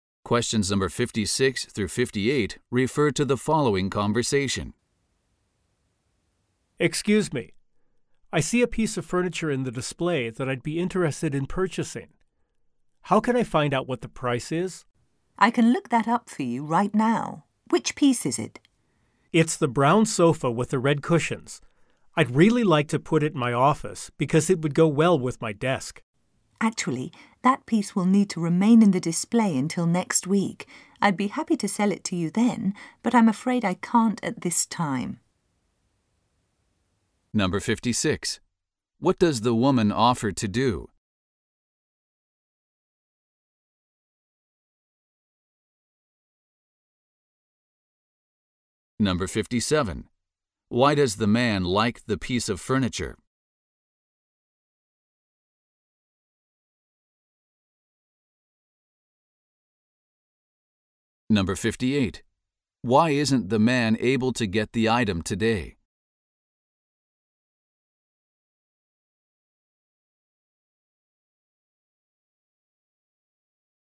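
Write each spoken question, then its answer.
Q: What does the woman offer to do?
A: Look up the price of the furniture

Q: Why does the man like the piece of furniture?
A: It would go well with his desk

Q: Why isn't the man able to get the item today?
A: It must stay in the display until next week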